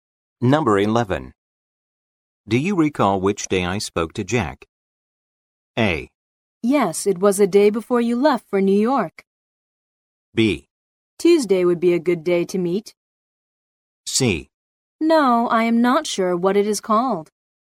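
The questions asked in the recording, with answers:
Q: Do you recall which day I spoke to Jack?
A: A: Yes, it was a day before you left for New York.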